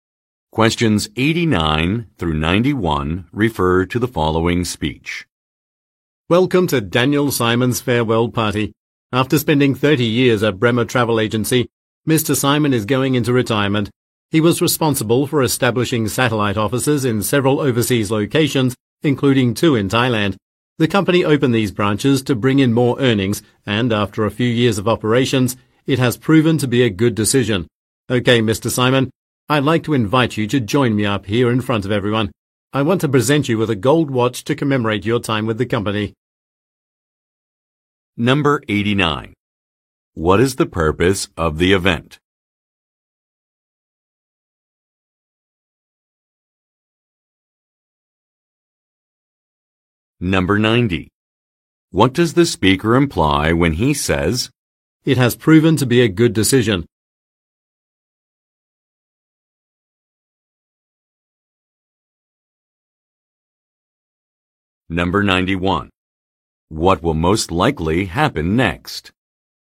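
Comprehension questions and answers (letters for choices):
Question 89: What is the purpose of the event?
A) To congratulate a colleague on a promotion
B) To welcome some new business partners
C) To thank several company leaders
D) To celebrate an employee's retirement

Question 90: What does the speaker imply when he says, "it has proven to be a good decision"?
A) An expansion has been profitable.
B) A merger was approved by authorities.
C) A business received positive publicity.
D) A firm has recruited impressive candidates.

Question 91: What will most likely happen next?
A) A gift will be given.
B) A speech will be made.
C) A meal will get under way.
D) A development will be explained.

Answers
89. D
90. A
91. A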